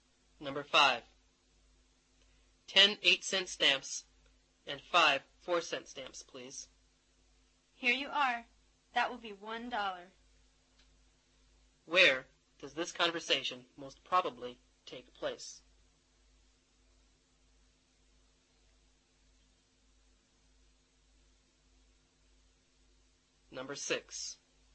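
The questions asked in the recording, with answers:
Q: Where does this conversation most probably take place?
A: At a post office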